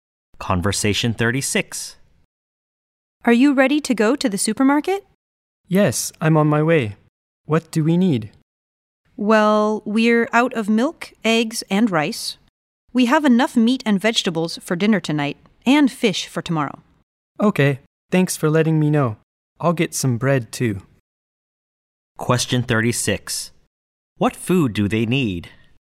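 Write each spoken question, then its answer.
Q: What food do they need?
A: Milk, eggs and rice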